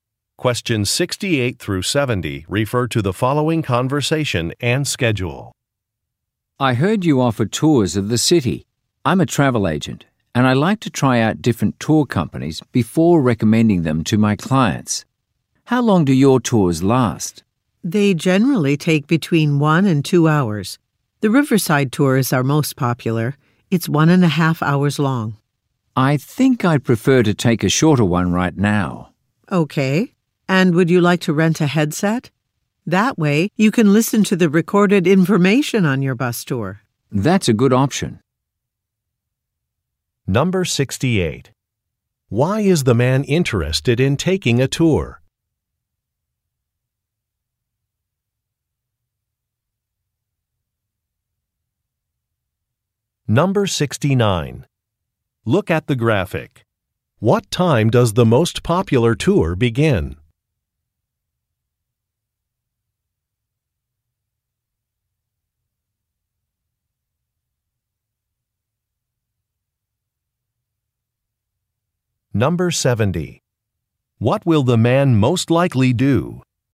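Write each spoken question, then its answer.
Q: Why is the man interested in taking a tour?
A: He is a travel agent trying tours before recommending them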